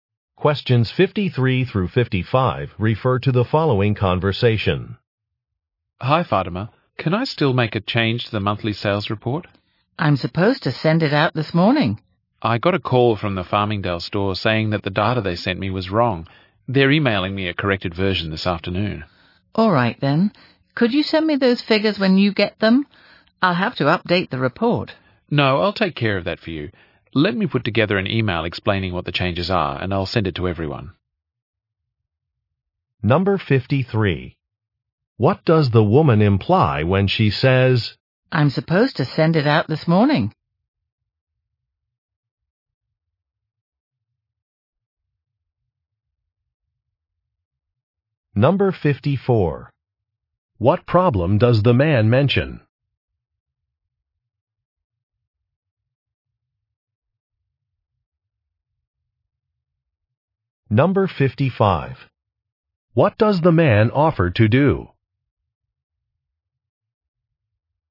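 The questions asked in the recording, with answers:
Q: What problem does the man mention?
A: A store sent him incorrect data

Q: What does the man offer to do?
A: Send an email explaining the changes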